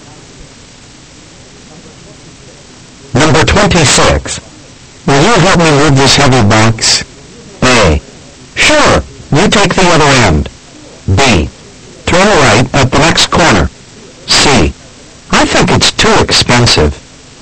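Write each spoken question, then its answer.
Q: Will you help me move this heavy box?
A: A: Sure. You take the other end.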